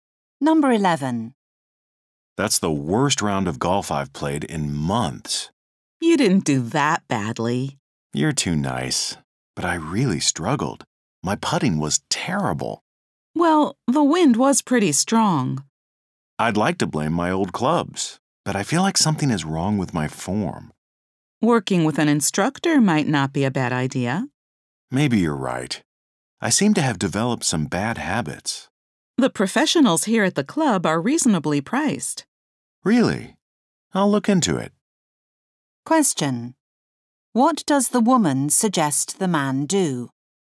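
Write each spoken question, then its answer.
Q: What does the woman suggest the man do?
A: Take lessons from an instructor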